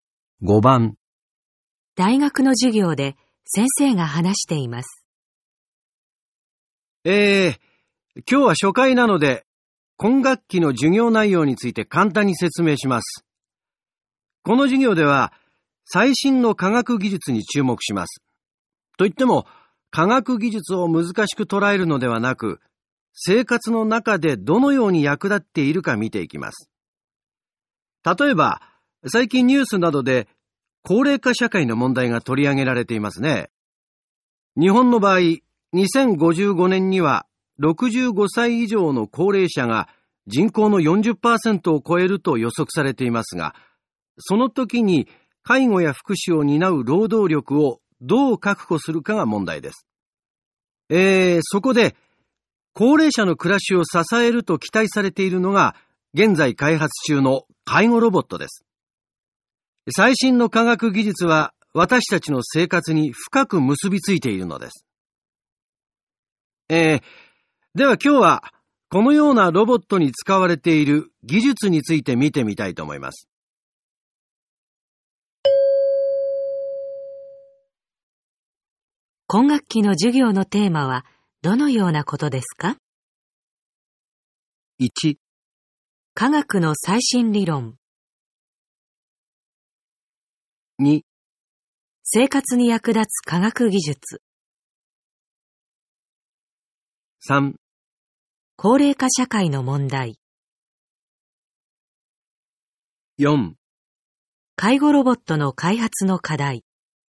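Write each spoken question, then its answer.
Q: 今学期の授業のテーマはどのようなことですか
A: 2: 生活に役立つ科学技術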